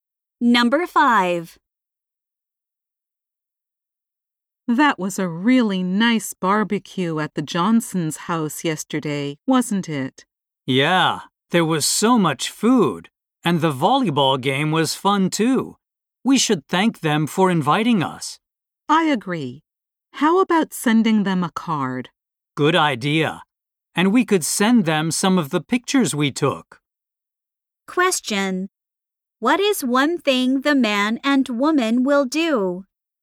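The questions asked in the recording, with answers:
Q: What is one thing the man and woman will do?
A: Send the Johnsons a thank-you card with photos.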